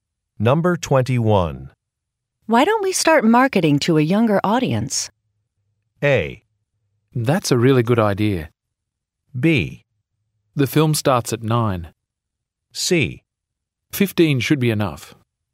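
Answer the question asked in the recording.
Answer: A: That's a really good idea.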